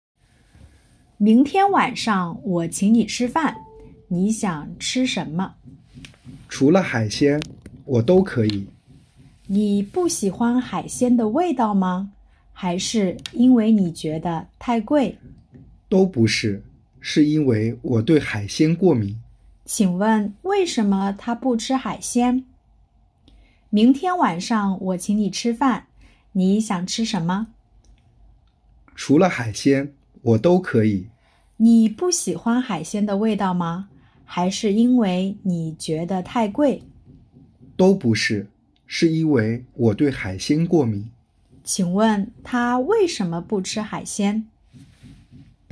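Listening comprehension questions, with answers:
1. 为什么他不吃海鲜?- wèishéme tā bù chī hǎixiān?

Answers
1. 因为他对海鲜过敏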